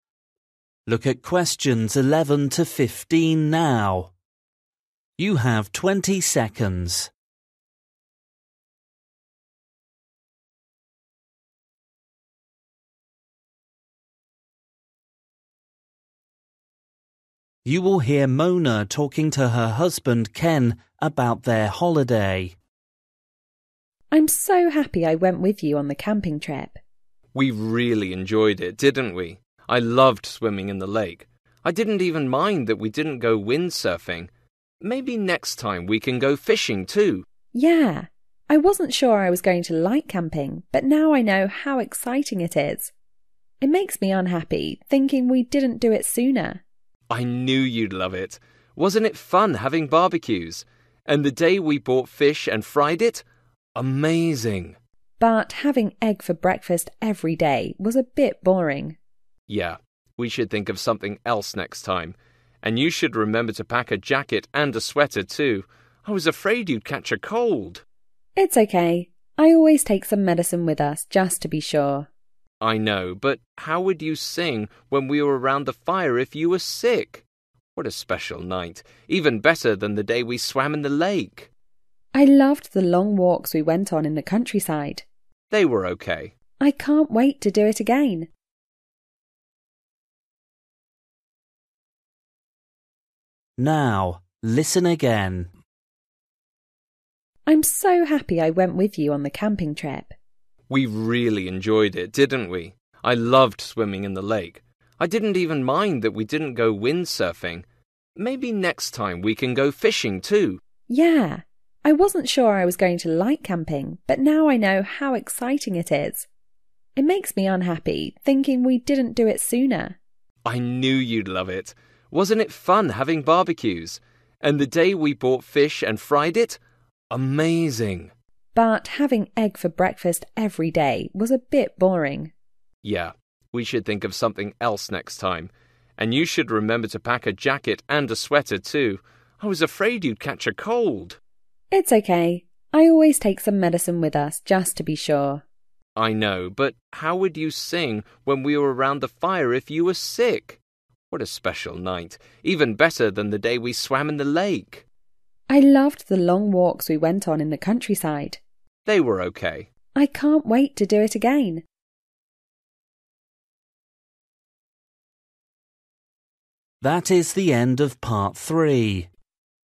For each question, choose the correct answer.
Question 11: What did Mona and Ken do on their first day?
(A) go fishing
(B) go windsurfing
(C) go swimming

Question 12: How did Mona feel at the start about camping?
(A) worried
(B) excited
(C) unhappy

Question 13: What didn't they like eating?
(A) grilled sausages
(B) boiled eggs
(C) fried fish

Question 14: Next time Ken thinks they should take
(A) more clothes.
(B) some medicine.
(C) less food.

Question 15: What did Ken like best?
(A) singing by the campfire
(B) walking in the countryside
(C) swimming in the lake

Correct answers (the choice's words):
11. go swimming
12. worried
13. boiled eggs
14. more clothes.
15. singing by the campfire

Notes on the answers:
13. But having egg for breakfast every day was a bit boring.

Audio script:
F: I'm so happy I went with you on the camping trip.
M: We really enjoyed it, didn't we? (11) I loved swimming in the lake. I didn't even mind that we didn't go windsurfing. Maybe next time we can go fishing too.
F: Yeah, (12) I wasn't sure I was going to like camping but now I know how exciting it is. It makes me unhappy thinking we didn't do it sooner.
M: I knew you'd love it. Wasn't it fun having barbecues? And the day we bought fish and fried it? Amazing!
F: (13) But having egg for breakfast every day was a bit boring.
M: Yeah, we should think of something else next time. (14) And you should remember to pack a jacket and a sweater too. I was afraid you'd catch a cold.
F: It's ok. I always take some medicine with us just to be sure.
M: (15) I know but how would you sing when we were around the fire if you were sick? What a special night, even better than the day we swam in the lake.
F: I loved the long walks we went on in the countryside.
M: They were OK.
F: I can't wait to do it again!

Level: KET (A2)